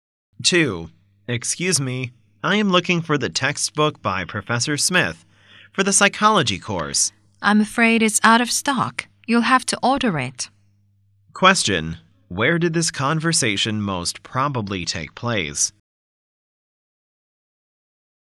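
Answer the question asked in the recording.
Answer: In a bookstore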